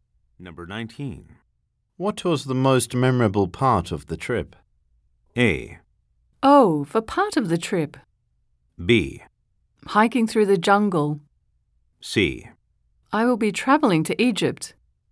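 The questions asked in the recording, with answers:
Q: What was the most memorable part of the trip?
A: B: Hiking through the jungle.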